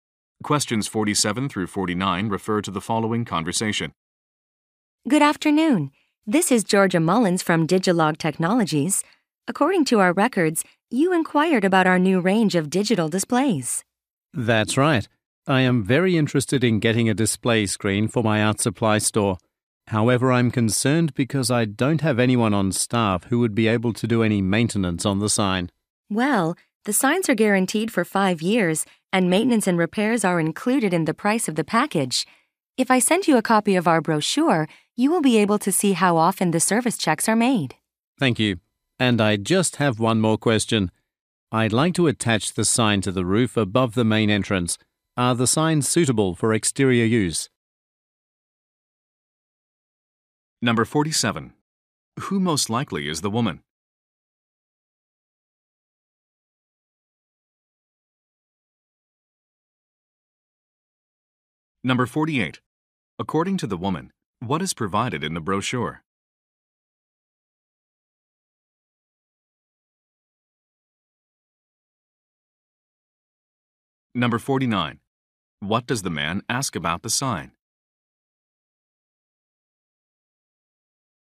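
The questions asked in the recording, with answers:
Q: Who most likely is the woman?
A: A salesperson for Digilog Technologies

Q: According to the woman, what is provided in the brochure?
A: How often service checks are made

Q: What does the man ask about the sign?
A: Whether it can be used outdoors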